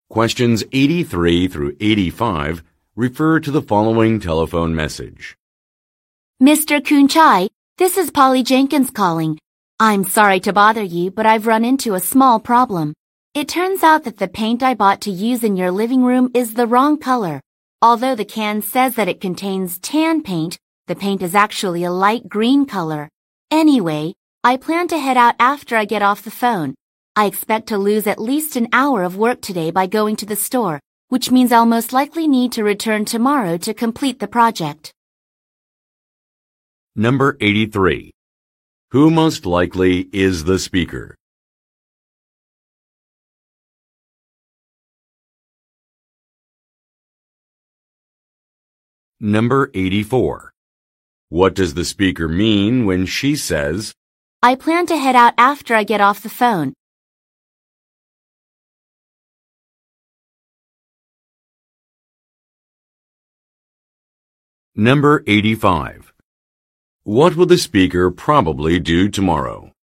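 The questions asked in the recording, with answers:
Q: Who most likely is the speaker?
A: A painter

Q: What does the speaker mean when she says, I plan to head out after I get off the phone?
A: She will go to the store to exchange the wrong paint

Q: What will the speaker probably do tomorrow?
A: Return to finish painting the living room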